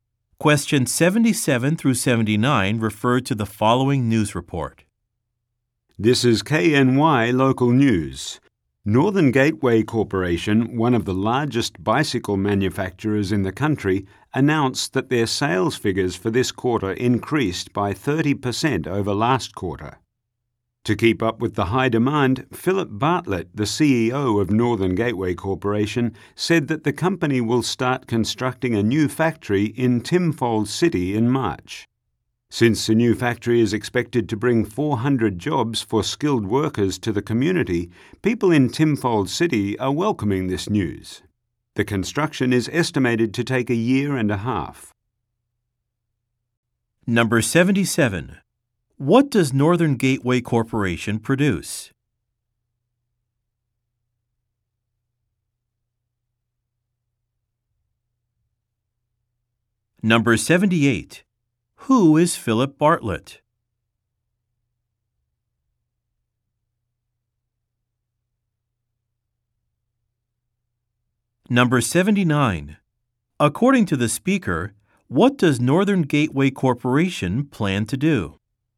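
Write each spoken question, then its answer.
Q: What does Northern Gateway Corporation produce?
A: Bicycles

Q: Who is Philip Bartlett?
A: The CEO of Northern Gateway Corporation

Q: According to the speaker, what does Northern Gateway Corporation plan to do?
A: Build a new factory in Timfold City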